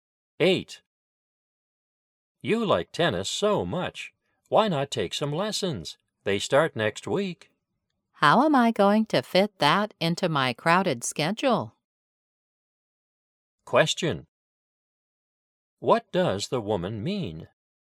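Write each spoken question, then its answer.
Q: What does the woman mean?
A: She is too busy to take lessons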